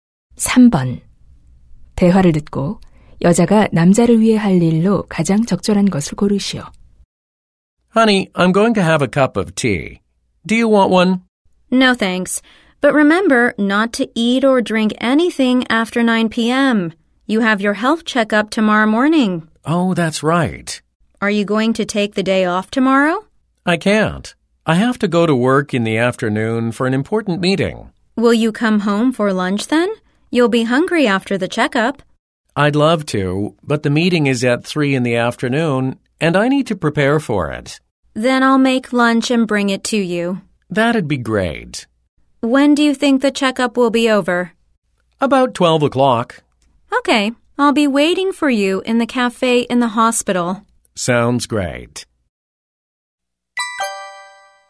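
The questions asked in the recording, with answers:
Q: 대화를 듣고 여자가 남자를 위해 할 일로 가장 적절한 것을 고르시오.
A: 점심 만들어 가져다주기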